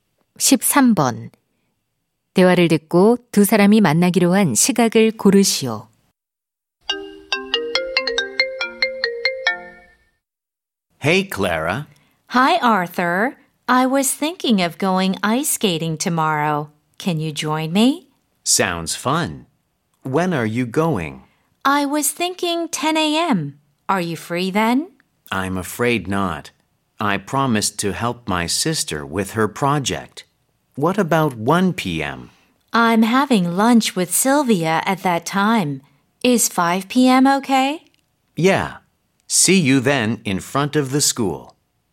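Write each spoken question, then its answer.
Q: 대화를 듣고 두 사람이 만나기로 한 시각을 고르시오.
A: 오후 5시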